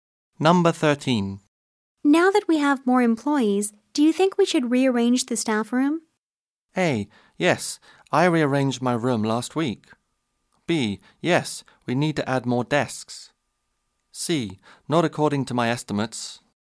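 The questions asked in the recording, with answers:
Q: Now that we have more employees, do you think we should rearrange the staff room?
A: B: Yes, we need to add more desks.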